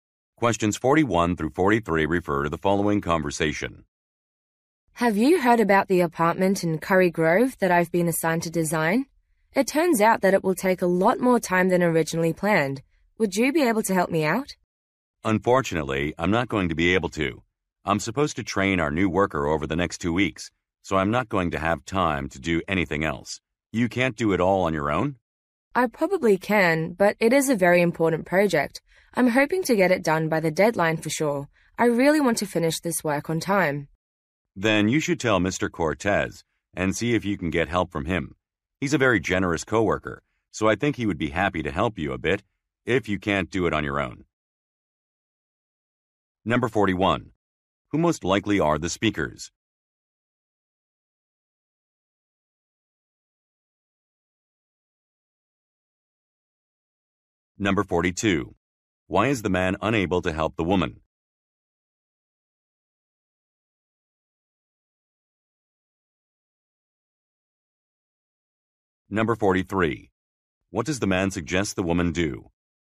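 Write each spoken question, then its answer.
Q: Why is the man unable to help the woman?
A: He has to train a new worker

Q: What does the man suggest the woman do?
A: Ask Mr. Cortez for help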